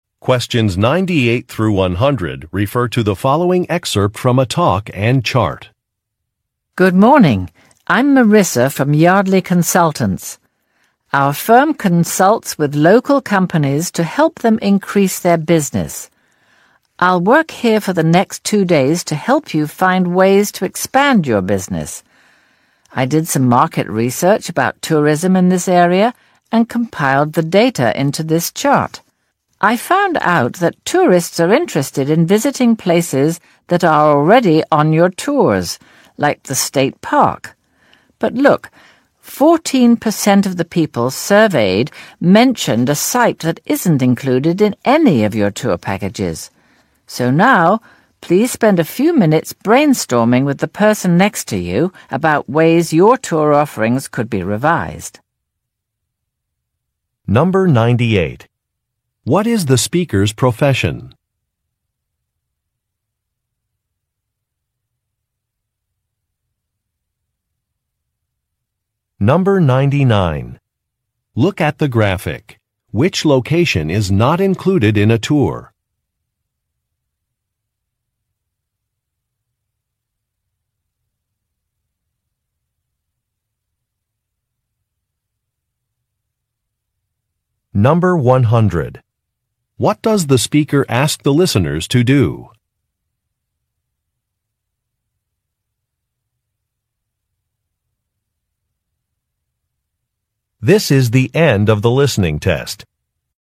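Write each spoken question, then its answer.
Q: What is the speaker's profession?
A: A business consultant

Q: What does the speaker ask the listeners to do?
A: Brainstorm with a partner about ways to revise their tour offerings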